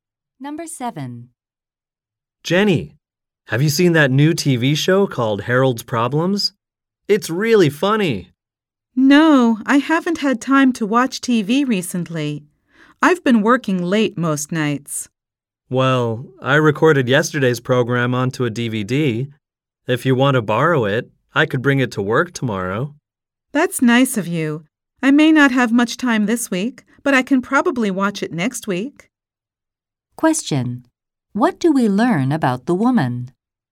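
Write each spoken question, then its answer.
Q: What do we learn about the woman?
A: She has been working late and has had no time to watch TV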